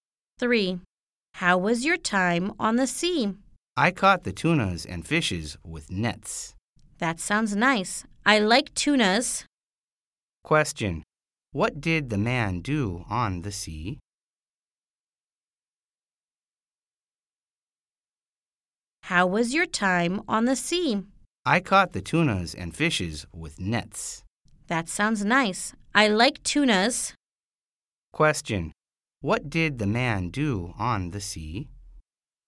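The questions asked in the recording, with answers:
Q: What did the man do on the sea?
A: He caught tunas and fish with nets.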